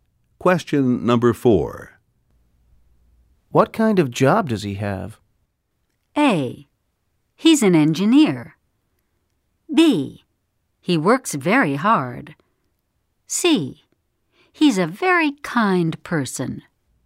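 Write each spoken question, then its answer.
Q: What kind of job does he have?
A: A: He's an engineer.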